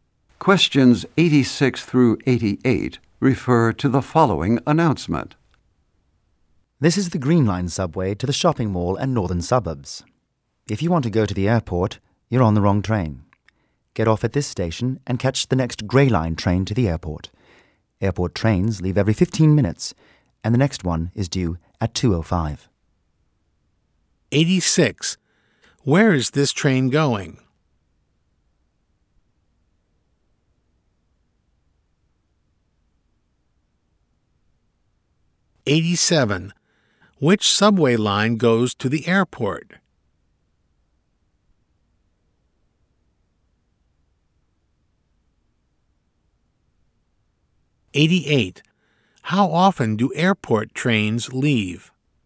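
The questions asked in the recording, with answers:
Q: Where is this train going?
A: To the shopping mall and northern suburbs

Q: Which subway line goes to the airport?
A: The Grey Line

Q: How often do airport trains leave?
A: Every 15 minutes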